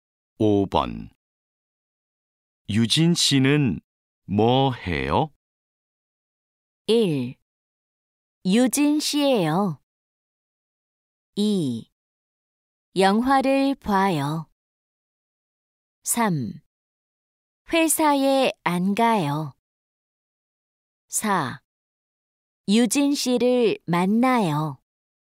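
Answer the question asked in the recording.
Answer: 2: 영화를 봐요.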